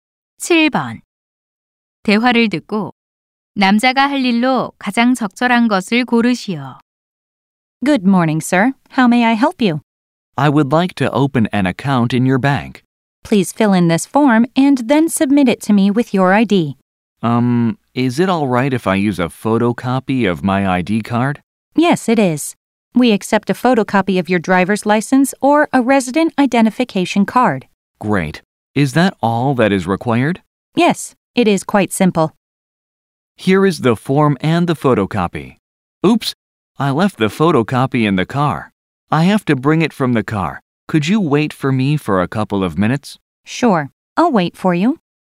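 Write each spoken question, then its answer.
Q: 대화를 듣고 남자가 할 일로 가장 적절한 것을 고르시오.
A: 차에 가서 신분증 사본을 가져오기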